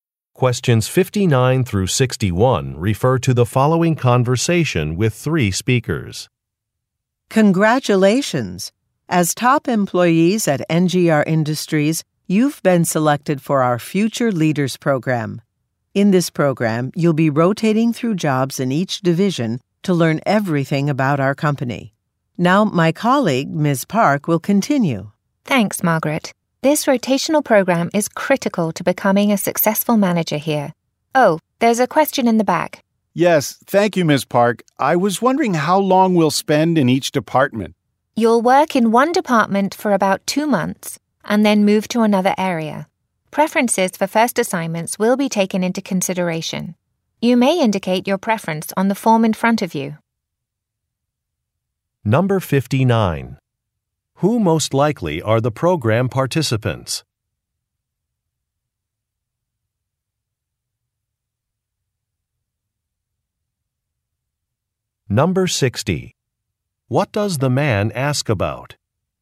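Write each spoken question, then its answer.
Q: Who most likely are the program participants?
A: Top employees selected for a future leaders program

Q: What does the man ask about?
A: How long they will spend in each department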